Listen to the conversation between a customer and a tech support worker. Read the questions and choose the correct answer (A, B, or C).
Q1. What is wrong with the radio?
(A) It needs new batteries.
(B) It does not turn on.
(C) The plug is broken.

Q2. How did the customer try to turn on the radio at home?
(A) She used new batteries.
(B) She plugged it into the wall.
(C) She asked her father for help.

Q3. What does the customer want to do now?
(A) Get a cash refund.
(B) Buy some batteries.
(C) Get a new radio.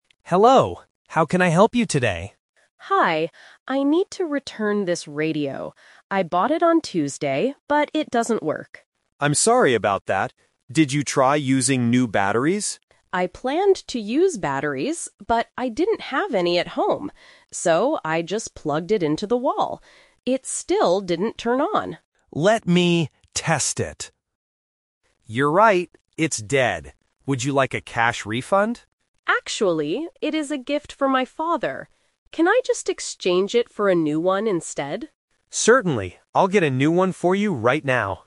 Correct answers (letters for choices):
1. B
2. B
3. C

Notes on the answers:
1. The customer clearly states, "It still didn't turn on." Why the trap is wrong: Option (A) is a trap. The tech asks if she tried new batteries, but that is not the actual problem with the radio. Option (C) is a plausible reason for electronics to fail, but it is not mentioned in the audio.
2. The customer says, "...I just plugged it into the wall." Why the trap is wrong: Option (A) is the "Twist" trap. She planned to use batteries, but she didn't have any at home, so she changed her method.
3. The customer says, "Can I just exchange it for a new one instead?" Why the trap is wrong: Option (A) is a major trap. The tech worker offers her a "cash refund," but she refuses because the radio is a gift for her father.

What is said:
Tech: Hello. How can I help you today?
Customer: Hi. I need to return this radio. I bought it on Tuesday, but it doesn't work.
Tech: I'm sorry about that. Did you try using new batteries?
Customer: I planned to use batteries, but I didn't have any at home. So, I just plugged it into the wall. It still didn't turn on.
Tech: Let me test it... You're right, it's dead. Would you like a cash refund?
Customer: Actually, it is a gift for my father. Can I just exchange it for a new one instead?